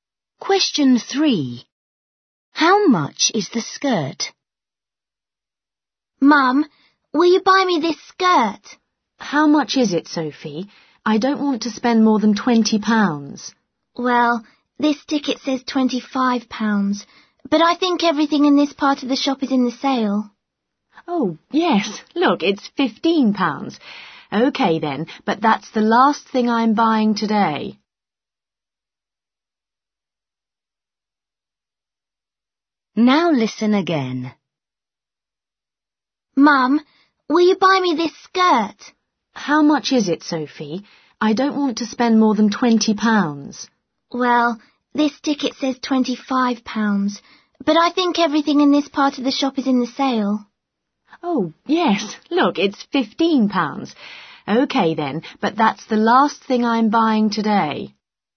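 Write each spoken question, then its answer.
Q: How much is the skirt?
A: £15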